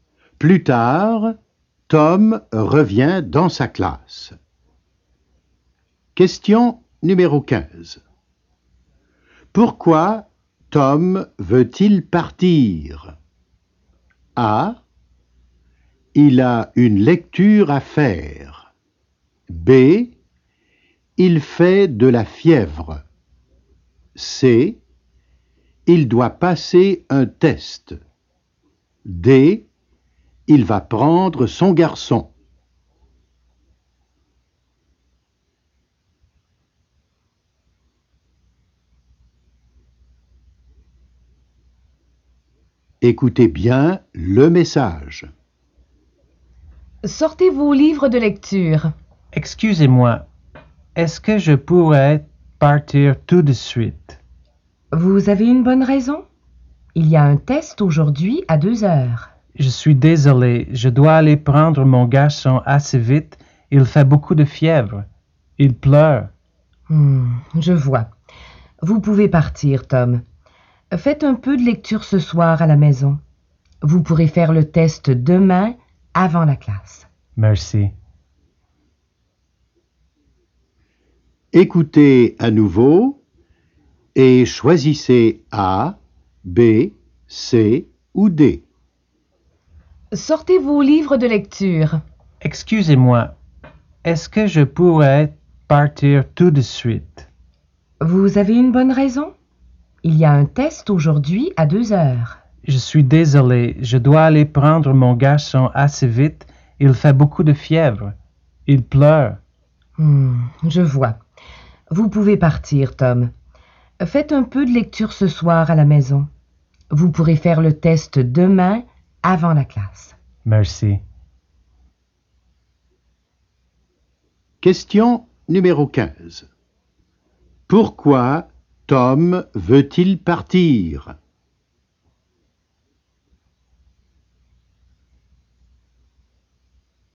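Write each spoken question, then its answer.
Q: Pourquoi Tom veut-il partir?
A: D: Il va prendre son garçon.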